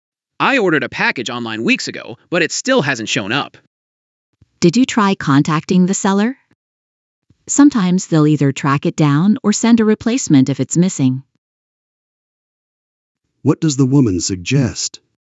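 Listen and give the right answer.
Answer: Contacting the seller to track the package or get a replacement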